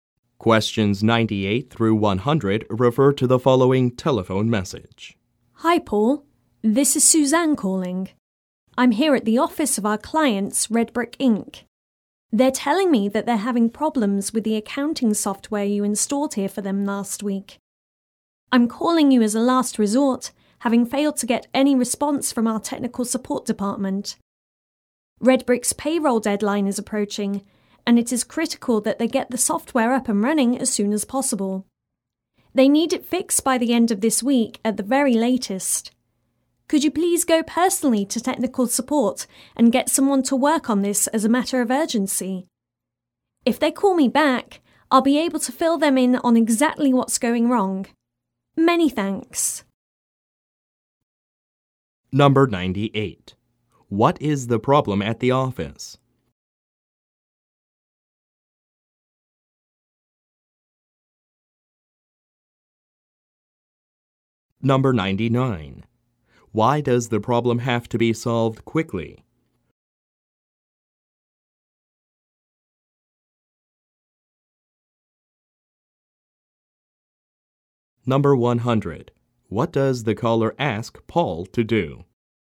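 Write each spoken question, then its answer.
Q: What is the problem at the office?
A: The accounting software is not working properly.

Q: Why does the problem have to be solved quickly?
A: Red Brick's payroll deadline is approaching.

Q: What does the caller ask Paul to do?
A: Go personally to technical support and get someone to work on it urgently.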